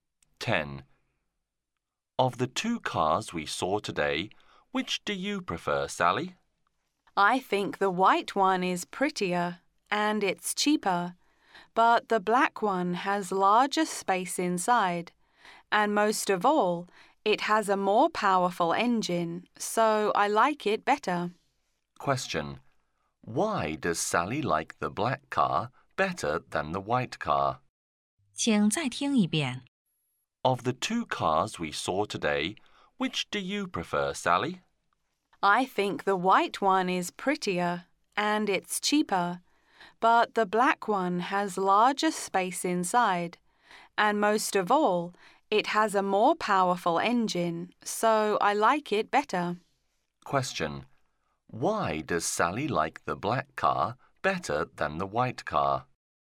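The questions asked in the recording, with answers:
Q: Why does Sally like the black car better than the white car?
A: It has a more powerful engine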